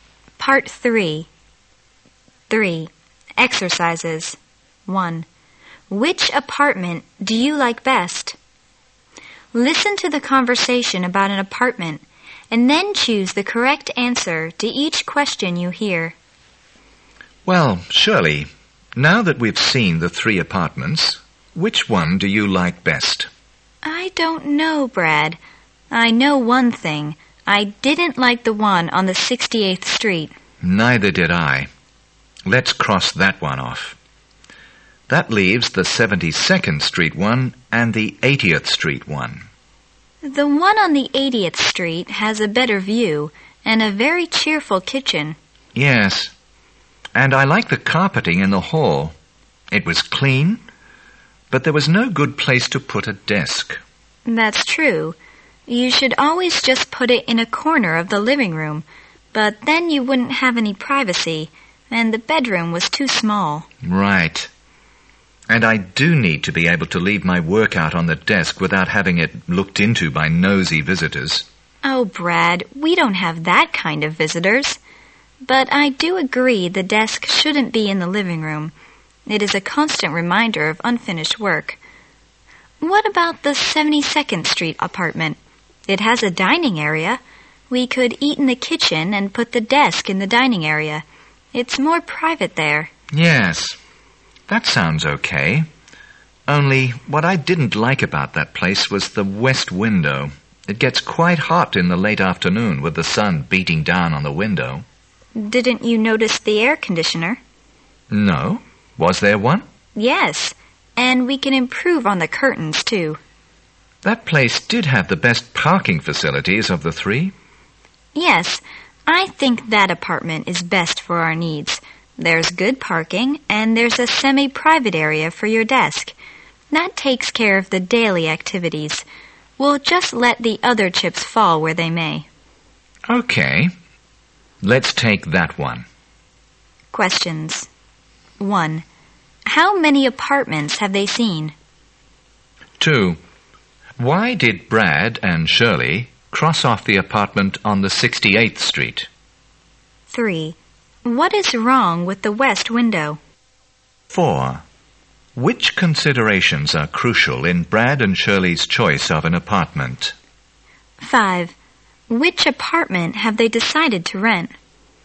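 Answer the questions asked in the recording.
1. Three
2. Neither of them liked it
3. It gets quite hot in the late afternoon from the sun
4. Good parking and a semi-private area for the desk
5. The one on 72nd Street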